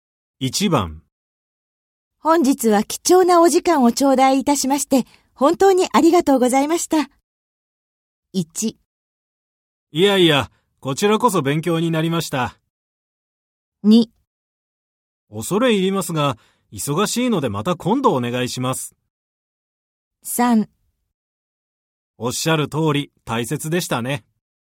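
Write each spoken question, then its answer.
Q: 本日は貴重なお時間を頂戴いたしまして、本当にありがとうございました。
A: 1: いやいや、こちらこそ勉強になりました。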